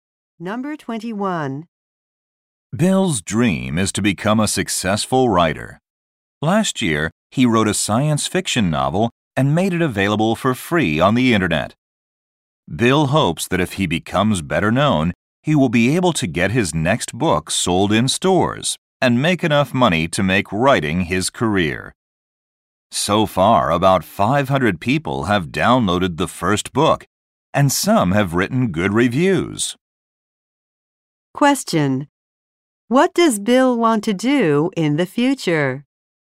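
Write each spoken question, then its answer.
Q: What does Bill want to do in the future?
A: Make writing his career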